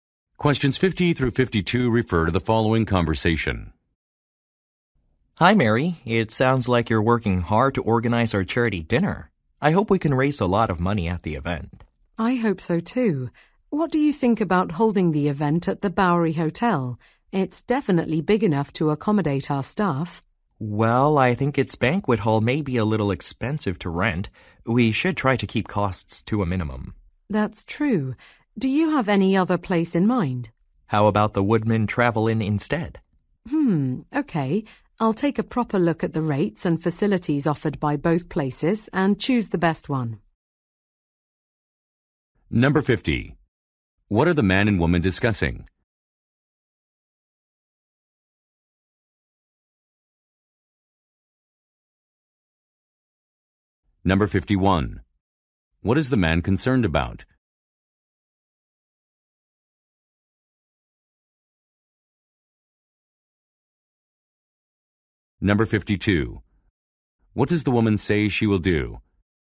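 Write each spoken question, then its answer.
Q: What are the man and woman discussing?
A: A venue for a charity dinner

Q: What is the man concerned about?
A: The cost of renting the banquet hall

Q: What does the woman say she will do?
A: Compare the rates and facilities of both places and choose one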